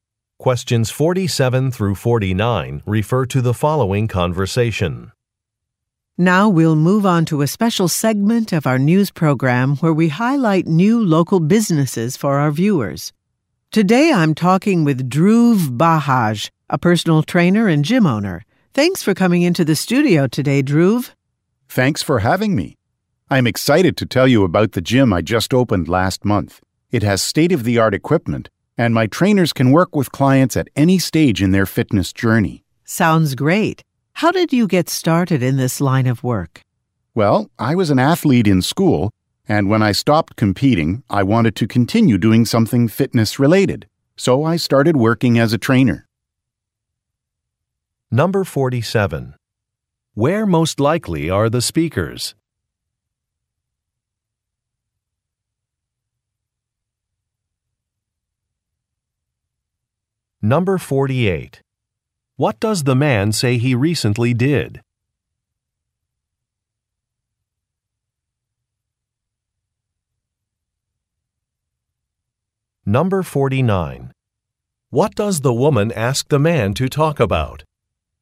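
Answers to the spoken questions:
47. In a TV news studio
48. Opened a gym
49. How he got started in his line of work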